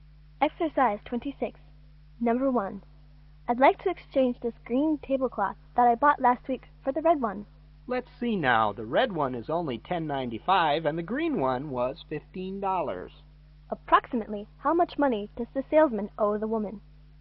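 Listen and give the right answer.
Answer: About $4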